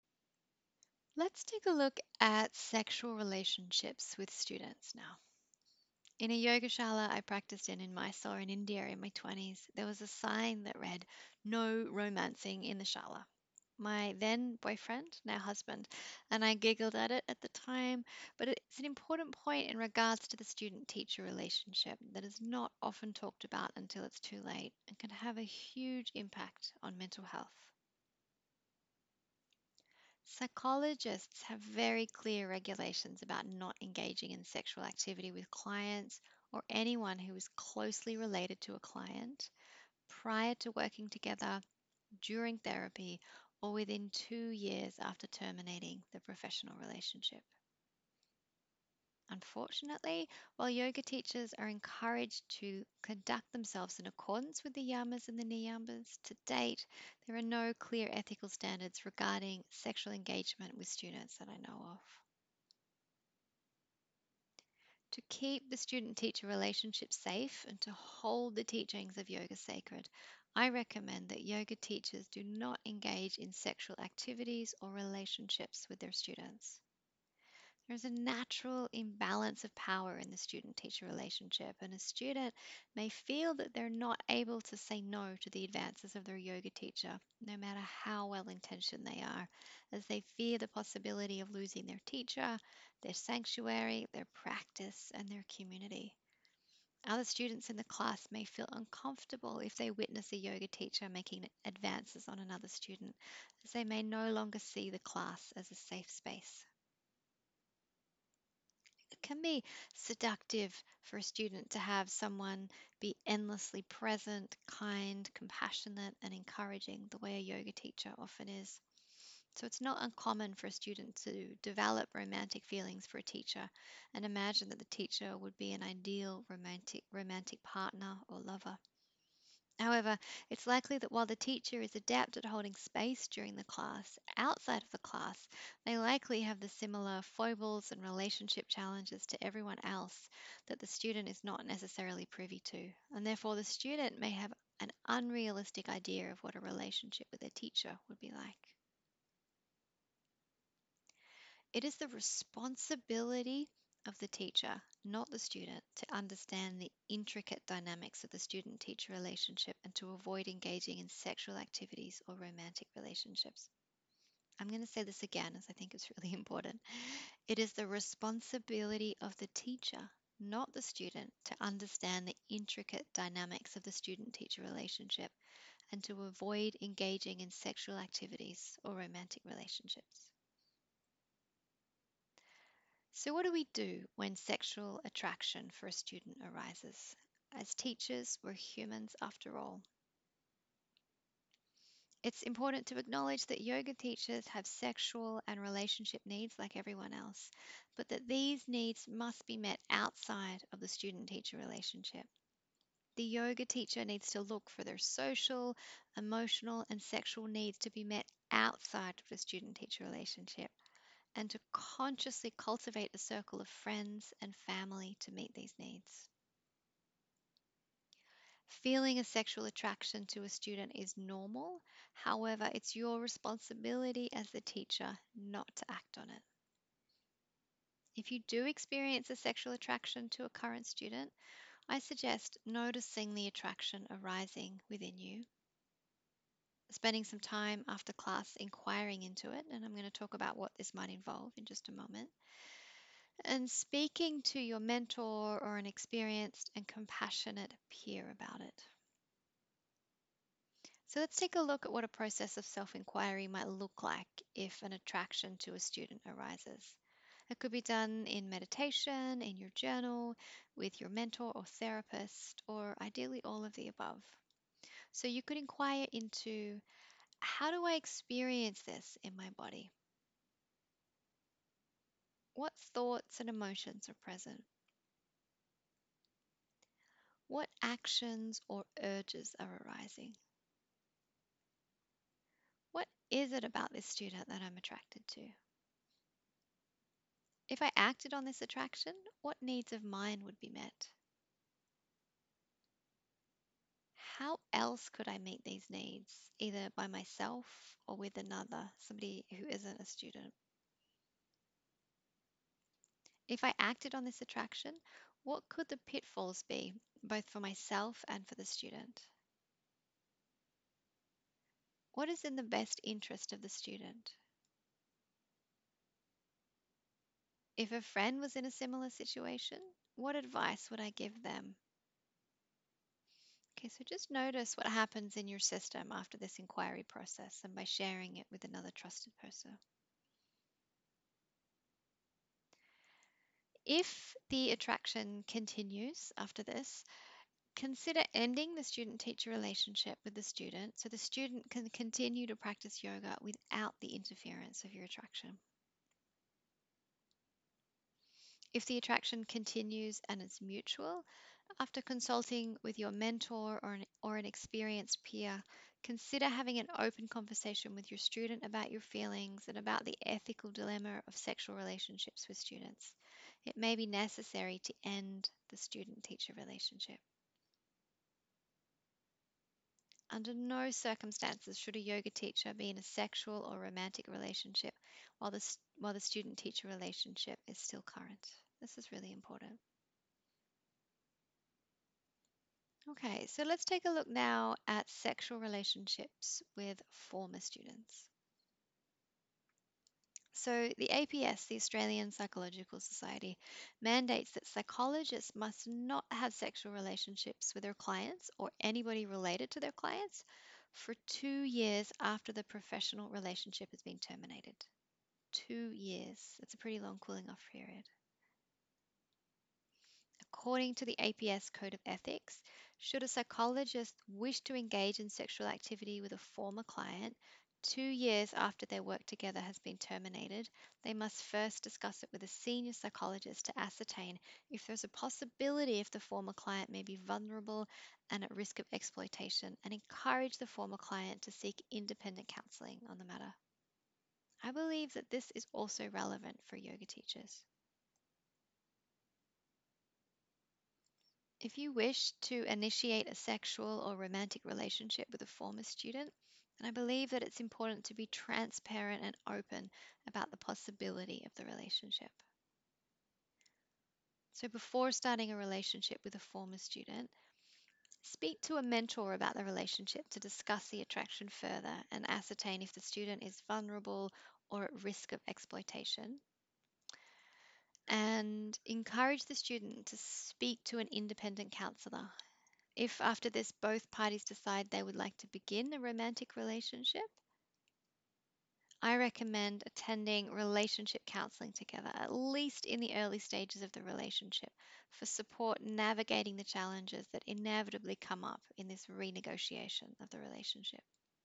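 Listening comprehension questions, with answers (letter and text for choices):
Please watch the lecture before undertaking this questionnaire.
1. A sexual relationship with a student you are currently teaching is:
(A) Fine.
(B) Ok as long as the teacher is a woman.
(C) Inappropriate.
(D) None of the above.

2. Who is responsible for understanding the intricate dynamics of the student-teacher relationship and avoiding engaging in sexual activities or romantic relationships?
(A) The student.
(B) The teacher.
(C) They have equal responsibility.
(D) It's no one's responsibility, as relationships between students and teachers are fine.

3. Before initiating a sexual relationship with a former student, it would be appropriate to:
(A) Discuss the potential relationship with your mentor, and ascertain if the student is vulnerable or at risk of exploitation.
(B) Discuss the potential relationship with the student, and if they're interested in engaging in the relationship, encourage them to speak to an independent counsellor about the possibility of the relationship.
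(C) If the student is interested in engaging in the relationship, attend relationship counselling together, for support navigating the challenges that inevitably come in the renegotiation of the relationship.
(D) All of the above.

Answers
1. (C) Inappropriate.
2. (B) The teacher.
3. (D) All of the above.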